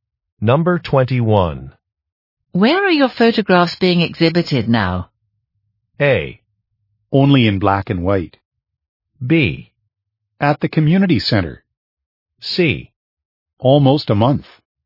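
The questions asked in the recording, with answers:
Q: Where are your photographs being exhibited now?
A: B: At the community center.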